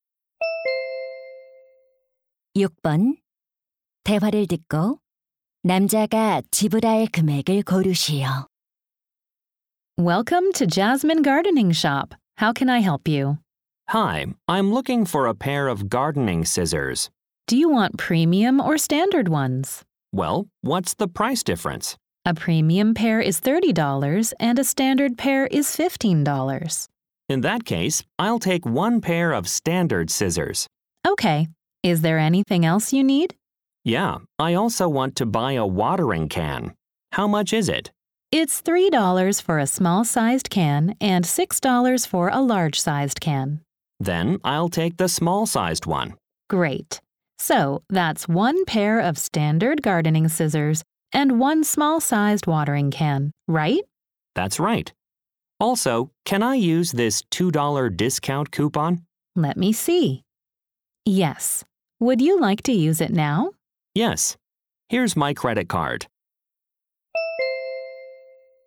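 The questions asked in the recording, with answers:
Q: 대화를 듣고 남자가 지불할 금액을 고르시오.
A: $16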